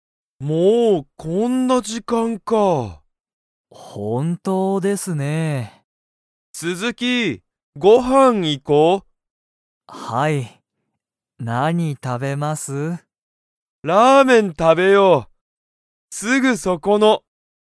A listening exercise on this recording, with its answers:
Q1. 斉藤さいとうさんは、鈴木すずきさんとご飯はんに行いきますか?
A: はい

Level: Level 1